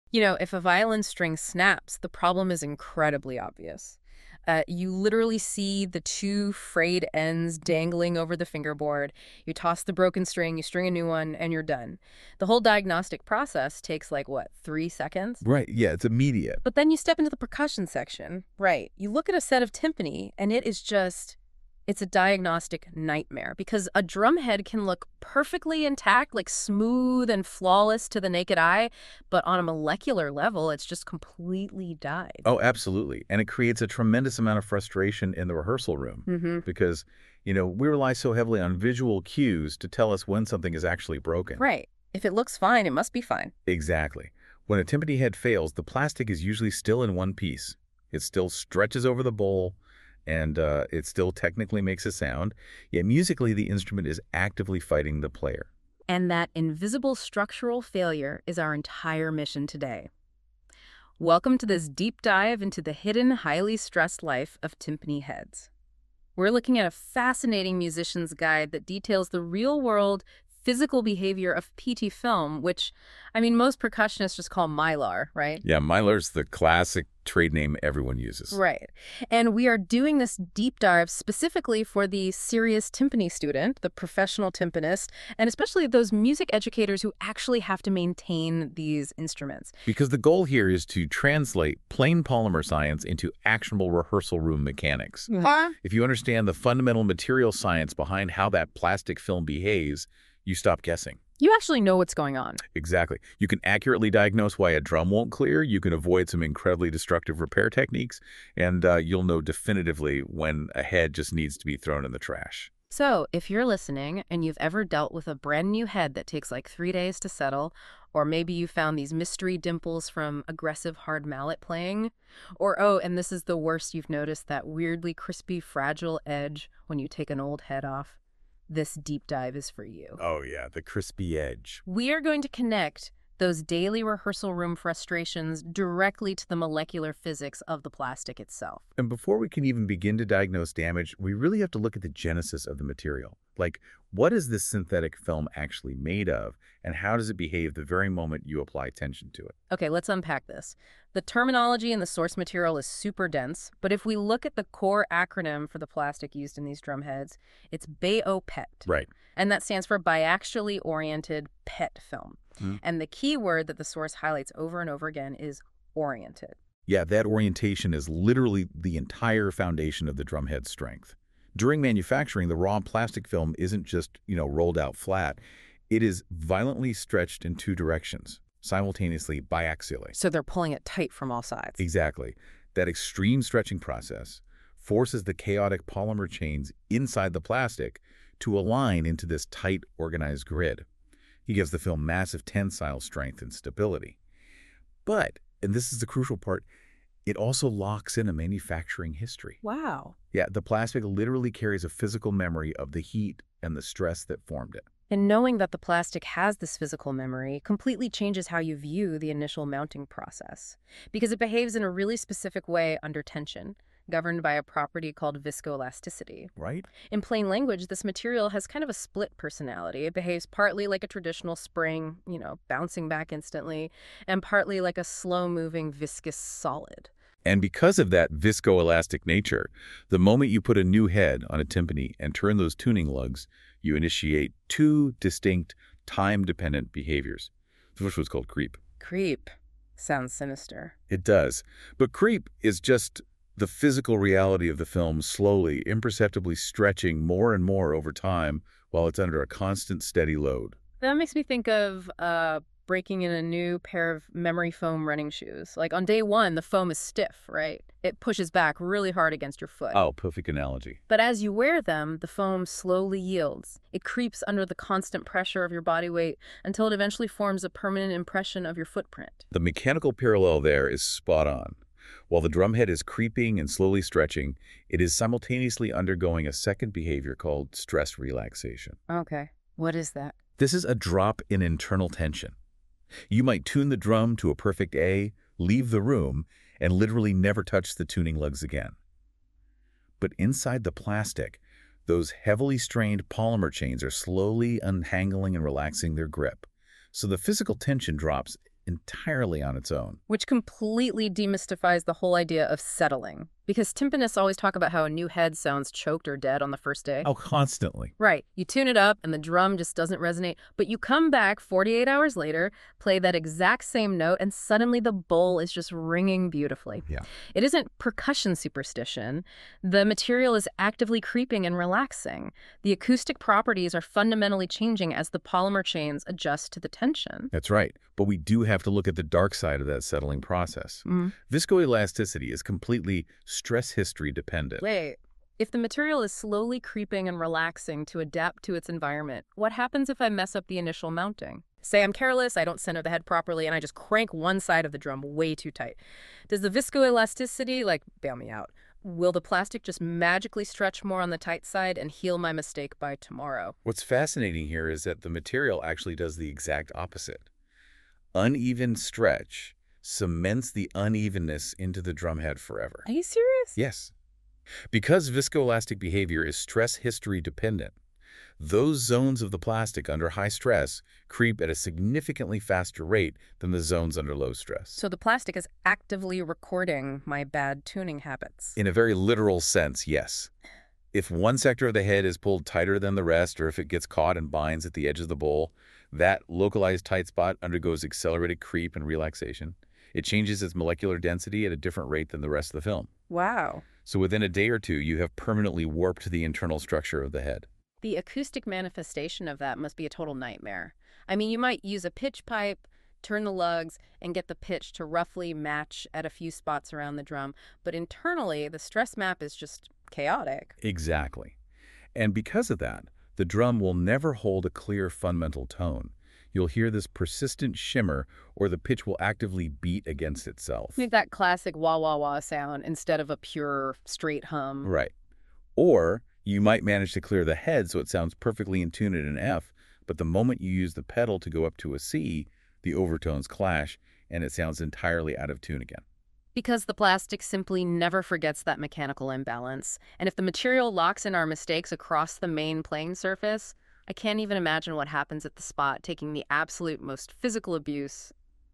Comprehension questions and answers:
Select a question to reveal the answer. Questions invite recall, analysis, application, or evaluation suitable for students and professionals.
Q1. What specific type of plastic film are most synthetic timpani heads made from?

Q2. In polymer science, the term _____ describes a material that behaves partly like a spring and partly like a slow-moving solid.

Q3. Term — Creep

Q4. Term — Stress relaxation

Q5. Why might a new timpani head require several days to "settle" and stabilize its pitch?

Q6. How do high-stress zones in a PET head compare to low-stress zones in terms of relaxation speed?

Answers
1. Biaxially oriented PET film (BOPET).
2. Viscoelastic.
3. The process where a material slowly stretches further over time while under a constant load.
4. The gradual reduction of tension over time while a material is held at a constant deformation.
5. Because PET is viscoelastic, experiencing time-dependent creep and stress relaxation.
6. High-stress zones change and relax faster than low-stress zones.